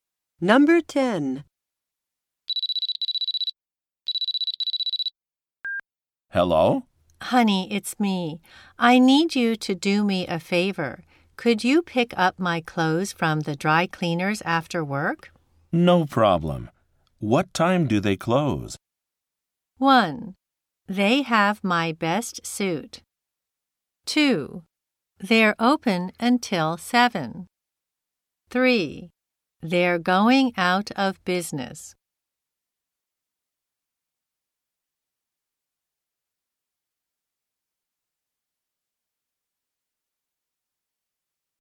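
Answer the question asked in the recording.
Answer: 2: They're open until 7.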